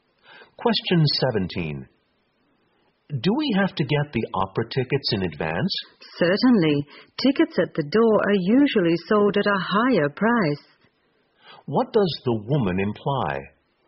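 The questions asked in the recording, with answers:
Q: What does the woman imply?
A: They should buy the tickets in advance because tickets at the door cost more.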